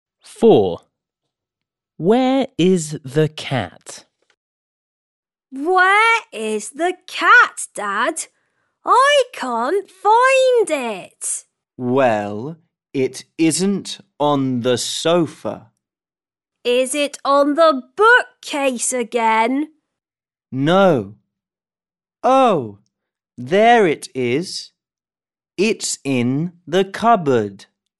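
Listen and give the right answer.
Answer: In the cupboard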